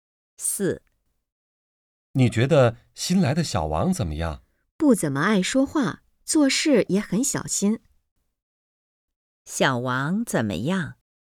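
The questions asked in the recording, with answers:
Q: 小王怎么样?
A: 不爱说话,做事很小心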